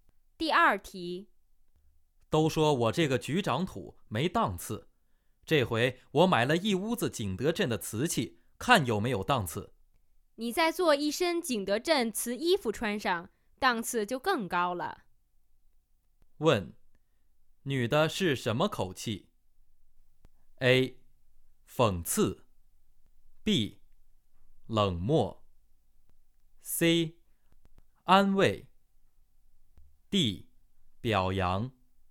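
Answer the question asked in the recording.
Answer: A: 讽刺。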